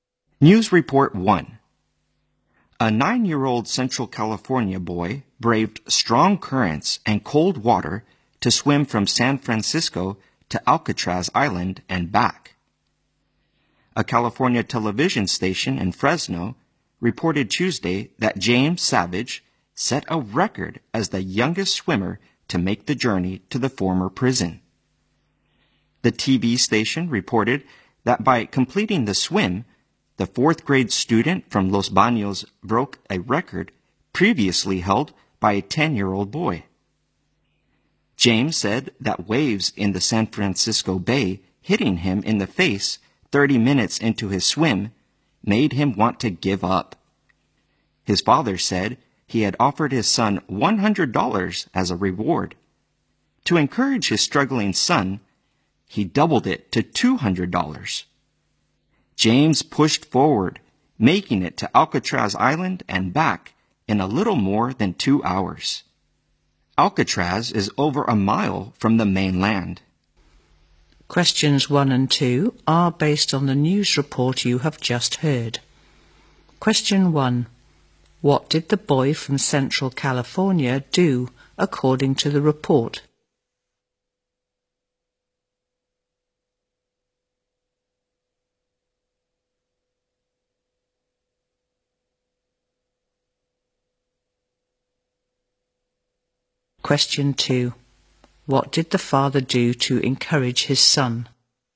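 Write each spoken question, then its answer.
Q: What did the boy from Central California do according to the report?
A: He swam from San Francisco to Alcatraz Island and back, setting a record as the youngest swimmer to do so.

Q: What did the father do to encourage his son?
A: He doubled the reward from $100 to $200.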